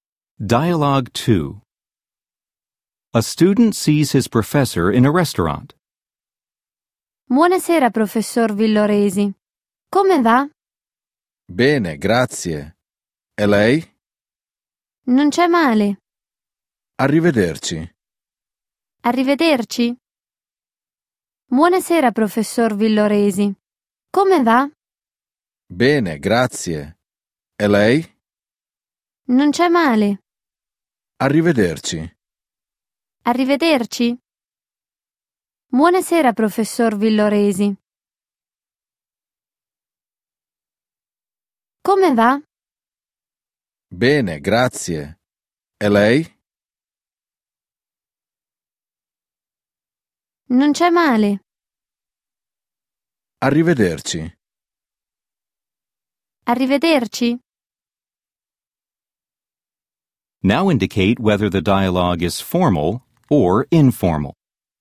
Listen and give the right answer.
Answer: 2. Formale.